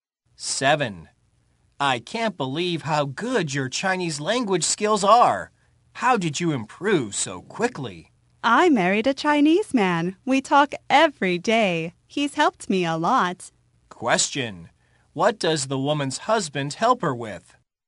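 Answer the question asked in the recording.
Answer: Her Chinese language skills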